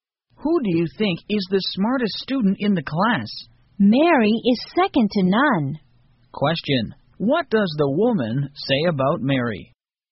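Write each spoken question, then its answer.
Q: Question, what does the woman say about Mary?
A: Mary is the smartest student in the class.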